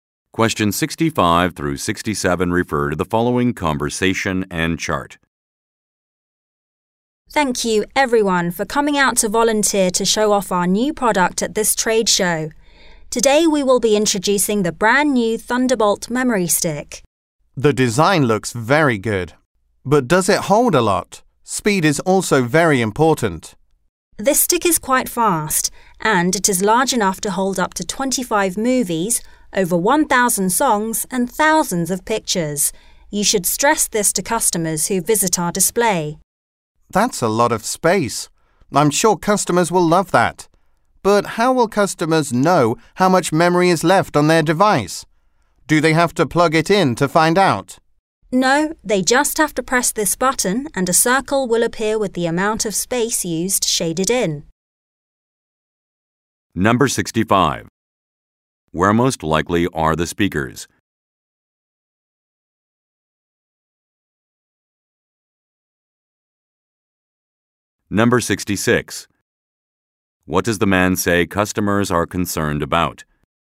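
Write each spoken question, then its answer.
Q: Where most likely are the speakers?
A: At a trade show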